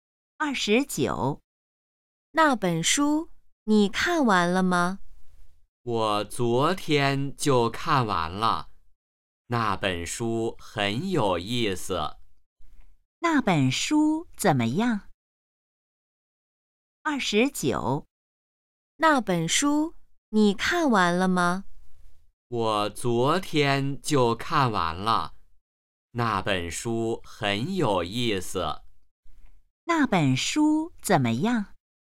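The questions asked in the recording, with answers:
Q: 那本书怎么样?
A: 很有意思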